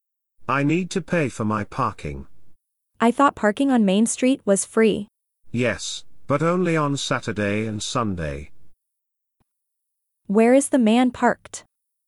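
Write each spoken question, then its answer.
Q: Where is the man parked?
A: on Main Street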